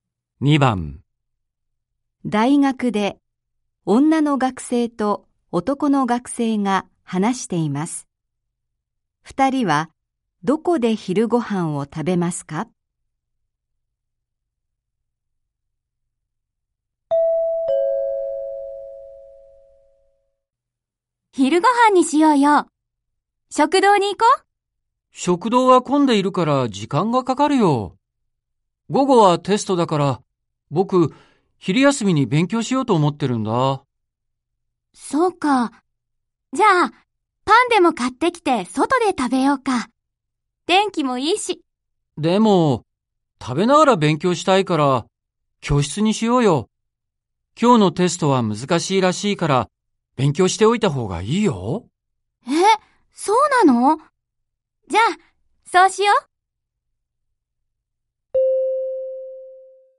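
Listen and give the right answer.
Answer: 教室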